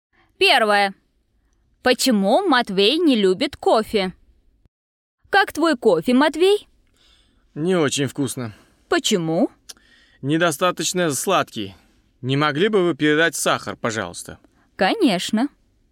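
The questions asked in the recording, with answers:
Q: Почему Матвей не любит кофе?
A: Недостаточно сладкий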